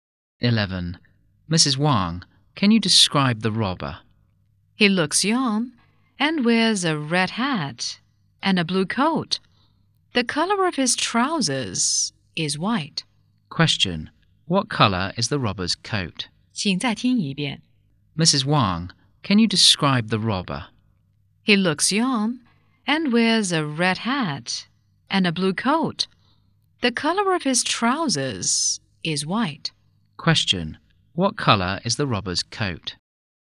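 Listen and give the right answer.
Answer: Blue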